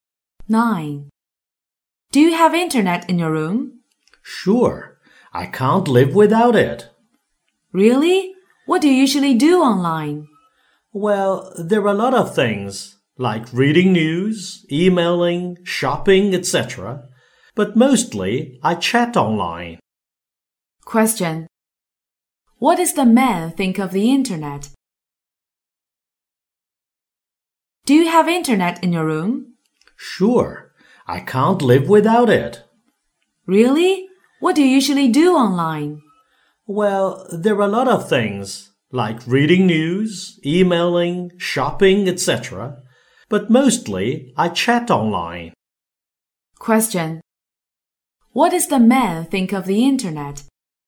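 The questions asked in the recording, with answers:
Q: What does the man think of the internet?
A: It is very important; he can't live without it.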